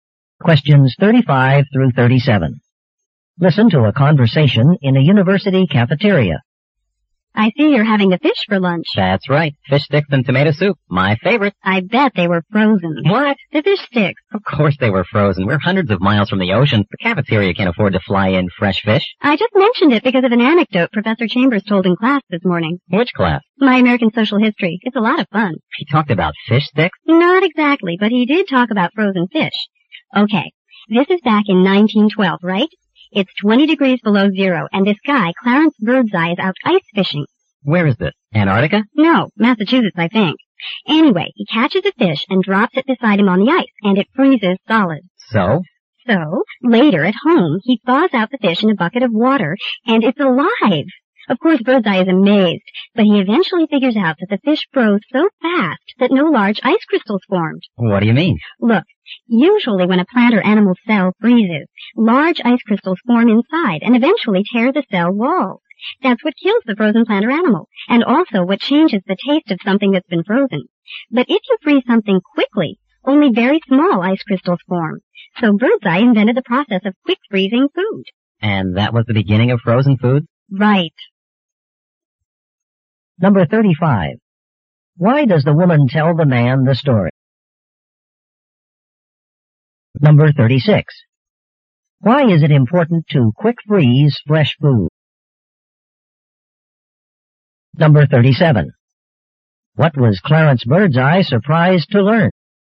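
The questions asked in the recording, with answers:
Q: Why is it important to quick freeze fresh food?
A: Only small ice crystals form, so cell walls aren't torn and the taste doesn't change.

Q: What was Clarence Birdseye surprised to learn?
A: The frozen fish was still alive after it thawed.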